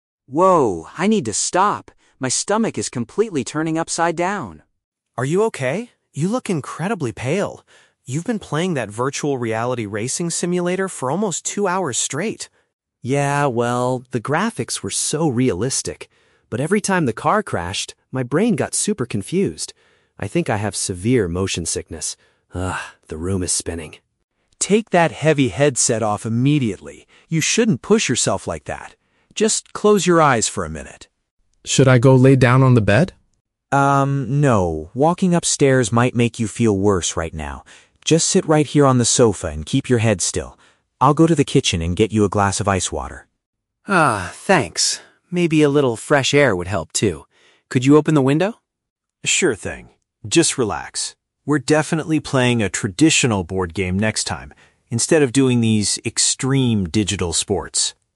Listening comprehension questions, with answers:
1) Why is Sam currently feeling unwell?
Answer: His body reacted badly to the digital driving experience.

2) Where does Alex suggest Sam should rest?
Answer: On the couch where they are currently located.

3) What is Alex going to fetch from another room?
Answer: A cold beverage to drink.

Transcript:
Sam: Whoa, I need to stop. My stomach is completely turning upside down.
Alex: Are you okay? You look incredibly pale. You've been playing that virtual reality racing simulator for almost two hours straight.
Sam: Yeah, well... the graphics were so realistic. But every time the car crashed, my brain got super confused. I think I have severe motion sickness. Ugh, the room is spinning.
Alex: Take that heavy headset off immediately. You shouldn't push yourself like that. Just close your eyes for a minute.
Sam: Should I go lay down on the bed?
Alex: Um, no, walking upstairs might make you feel worse right now. Just sit right here on the sofa and keep your head still. I'll go to the kitchen and get you a glass of ice water.
Sam: Ah, thanks. Maybe a little fresh air would help, too. Could you open the window?
Alex: Sure thing. Just relax. We're definitely playing a traditional board game next time instead of doing these extreme digital sports.